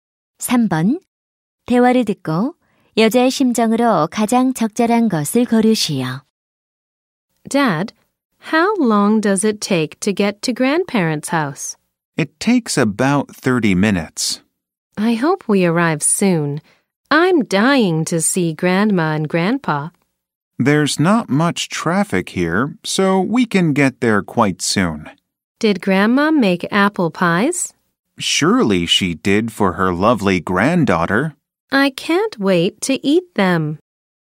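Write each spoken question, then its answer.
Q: 대화를 듣고 여자의 심정으로 가장 적절한 것을 고르시오.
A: 신남, 기대됨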